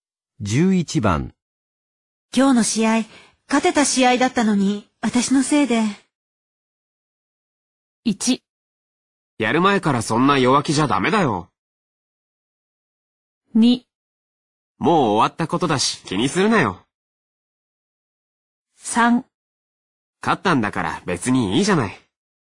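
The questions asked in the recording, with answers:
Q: 今日の試合、勝てた試合だったのに、私のせいで。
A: 2: もう終わったことだし、気にするなよ。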